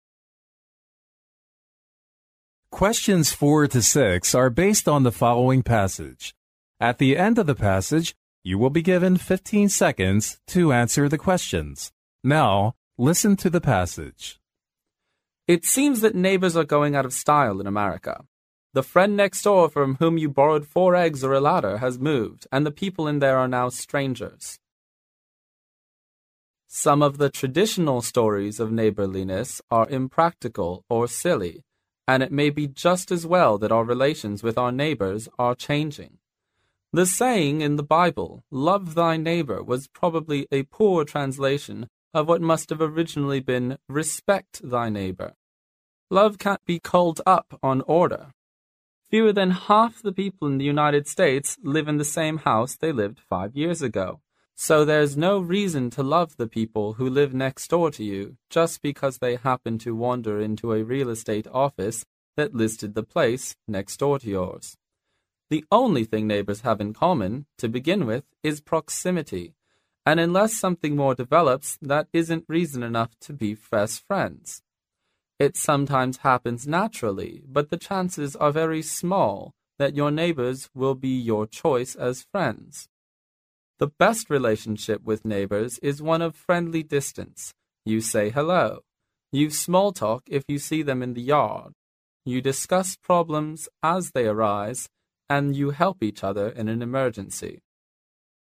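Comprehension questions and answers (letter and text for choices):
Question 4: According to the speaker,"Love Thy Neighbor" should originally be______.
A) "Visit Thy Neighbor"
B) "Help Thy Neighbor"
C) "Invite Thy Neighbor"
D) "Respect Thy Neighbor"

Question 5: There's no reason to love the peoplewho live next door to you,because people_____.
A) are frequently moving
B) are always too busy to do that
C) are hostile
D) always live far away from each other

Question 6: According to the speaker, people should do the following to keep a better neighborhood relationship EXCEPT_____.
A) discussing problems as they arise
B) greeting each other when meeting in the yard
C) calling on your neighbors frequently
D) helping each other in an emergency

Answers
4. D) "Respect Thy Neighbor"
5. A) are frequently moving
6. C) calling on your neighbors frequently

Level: 英语四级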